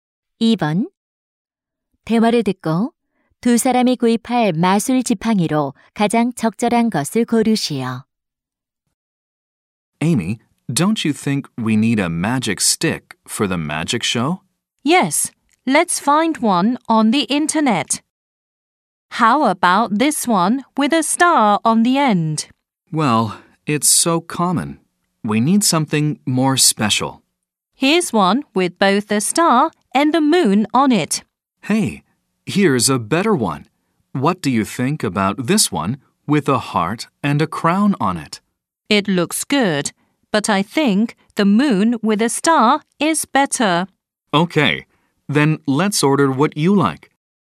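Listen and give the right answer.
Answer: 별과 달이 있는 지팡이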